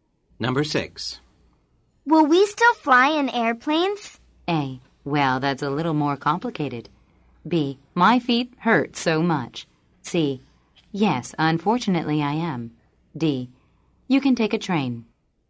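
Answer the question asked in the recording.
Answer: A: Well, that's a little more complicated.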